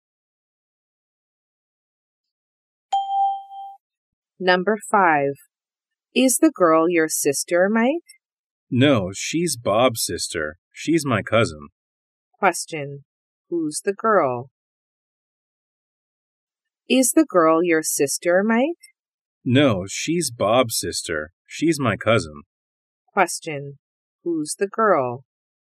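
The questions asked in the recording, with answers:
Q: Who's the girl?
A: Mike's cousin (Bob's sister)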